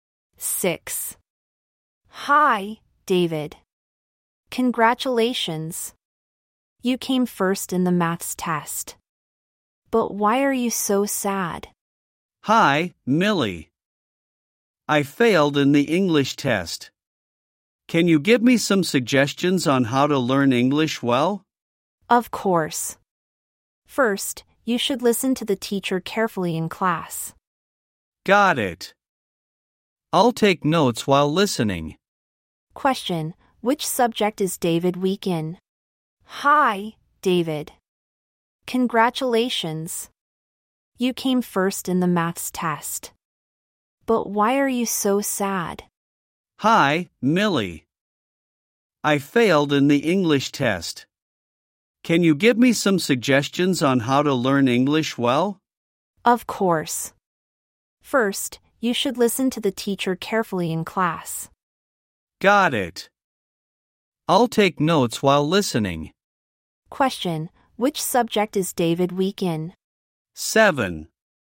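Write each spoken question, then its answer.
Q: Question, which subject is David weak in?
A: English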